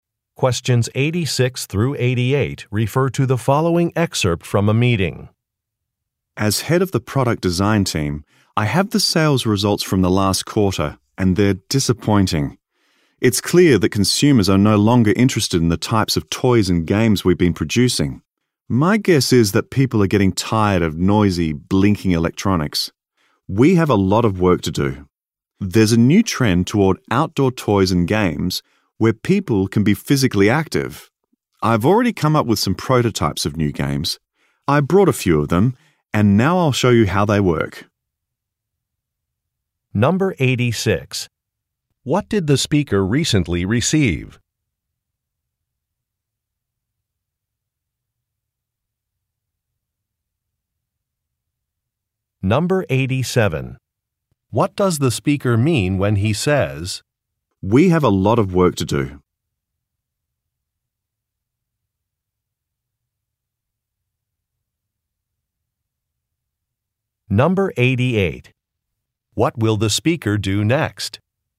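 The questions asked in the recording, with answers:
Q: What did the speaker recently receive?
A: Sales results from the last quarter

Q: What will the speaker do next?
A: Show how some new game prototypes work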